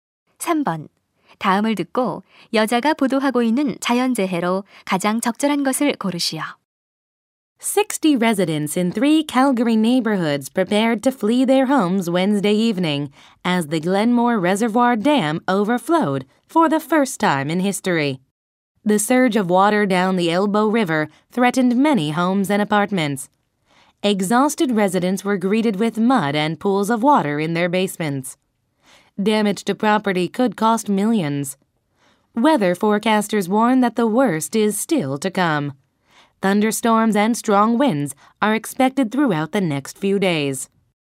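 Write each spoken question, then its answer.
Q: 다음을 듣고 여자가 보도하고 있는 자연재해로 가장 적절한 것을 고르시오.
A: 홍수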